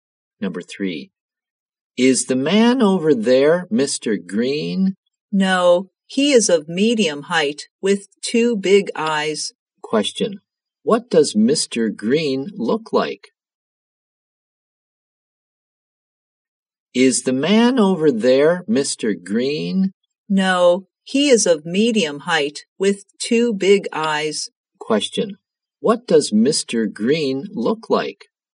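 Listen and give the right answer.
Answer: He is of medium height with two big eyes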